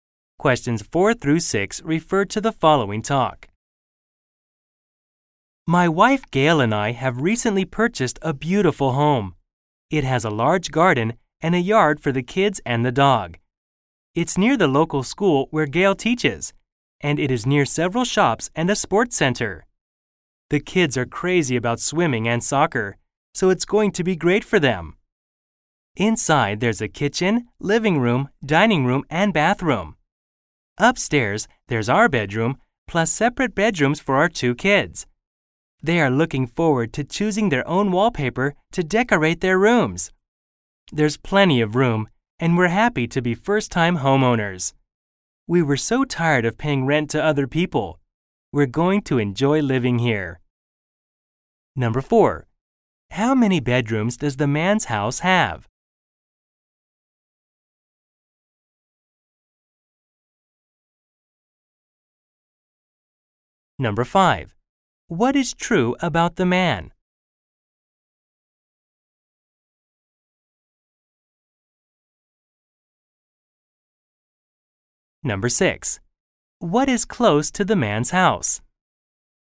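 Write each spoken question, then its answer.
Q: How many bedrooms does the man's house have?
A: Three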